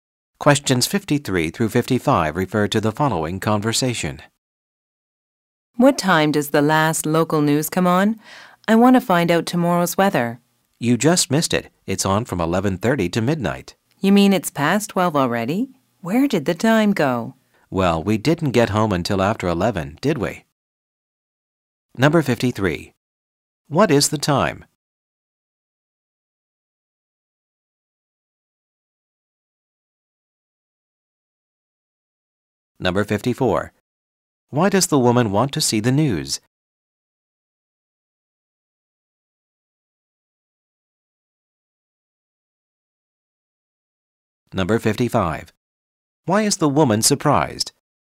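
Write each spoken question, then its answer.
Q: What is the time?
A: After midnight

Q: Why does the woman want to see the news?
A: To find out tomorrow's weather

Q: Why is the woman surprised?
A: It's already past midnight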